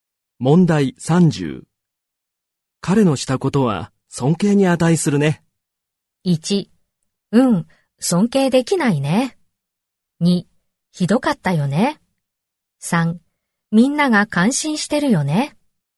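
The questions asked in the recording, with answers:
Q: 彼のしたことは尊敬に値するね。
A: 3: みんなが感心してるよね。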